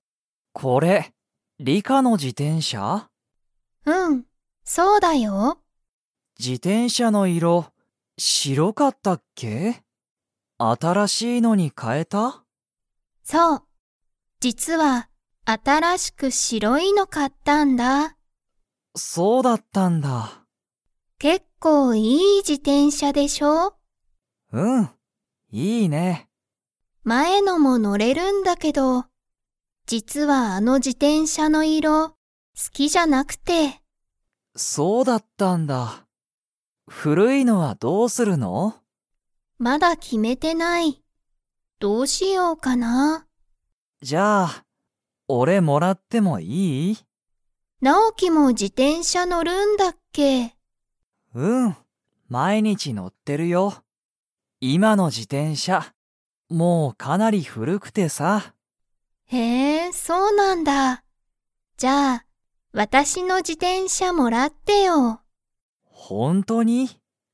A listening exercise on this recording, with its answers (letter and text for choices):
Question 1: リカの前まえの自転車じてんしゃは白しろいですか?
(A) はい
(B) いいえ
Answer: (B) いいえ

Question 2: ナオキの今いまの自転車じてんしゃは 。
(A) 古ふるい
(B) 高たかい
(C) 小ちいさい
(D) きれい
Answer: (A) 古ふるい

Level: Level 3